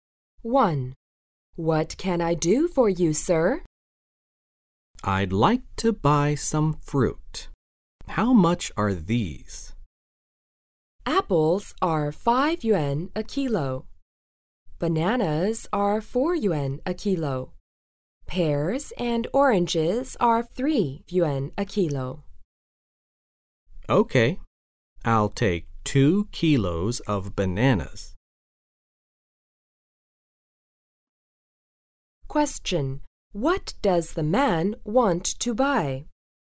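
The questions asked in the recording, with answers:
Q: What does the man want to buy?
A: Bananas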